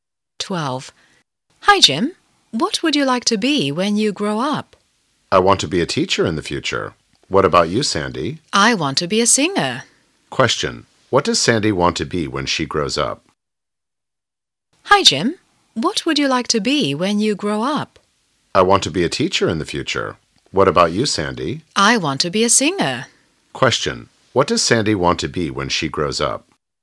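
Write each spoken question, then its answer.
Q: What does Sandy want to be when she grows up?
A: A singer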